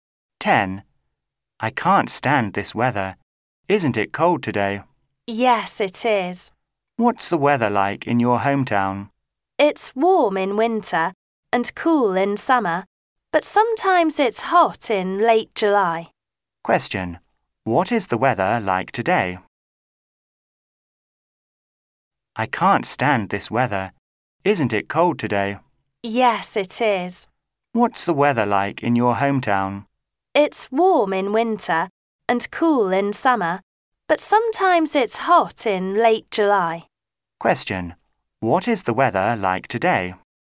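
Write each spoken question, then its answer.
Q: What is the weather like today?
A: Cold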